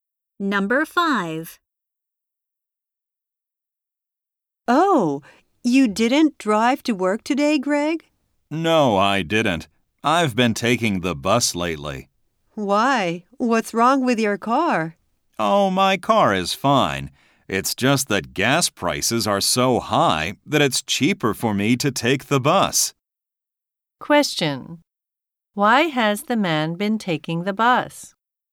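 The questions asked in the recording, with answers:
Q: Why has the man been taking the bus?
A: Gas prices are high, so the bus is cheaper.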